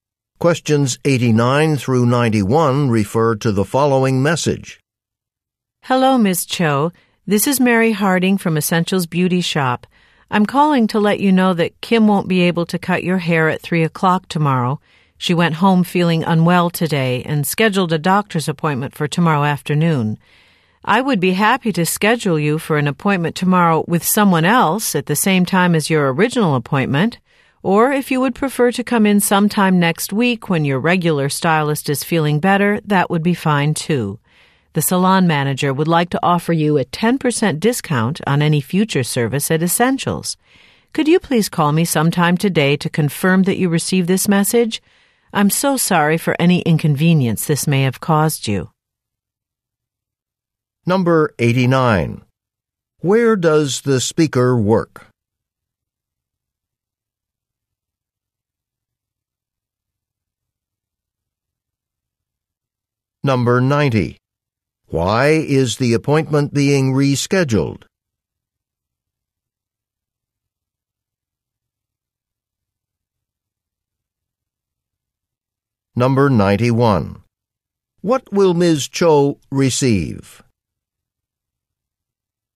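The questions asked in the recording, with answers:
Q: Where does the speaker work?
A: At a beauty shop (hair salon)

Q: Why is the appointment being rescheduled?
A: The stylist is sick

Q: What will Ms. Cho receive?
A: A 10% discount on a future service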